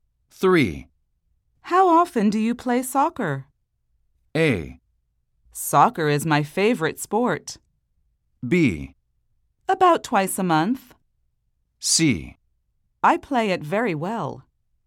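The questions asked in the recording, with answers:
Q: How often do you play soccer?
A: B: About twice a month.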